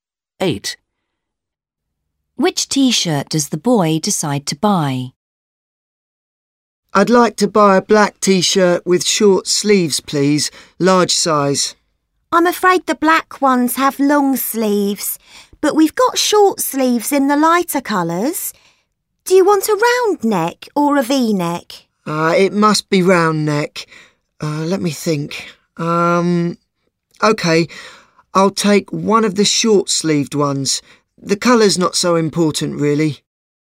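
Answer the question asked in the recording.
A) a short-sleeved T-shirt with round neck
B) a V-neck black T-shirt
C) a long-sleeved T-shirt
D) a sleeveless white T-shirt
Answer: A) a short-sleeved T-shirt with round neck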